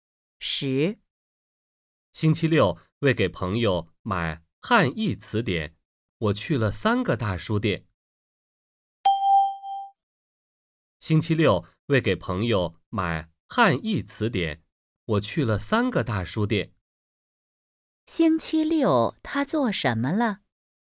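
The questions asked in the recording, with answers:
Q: 星期六他做什么了?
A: 为给朋友买汉译词典去了三个大书店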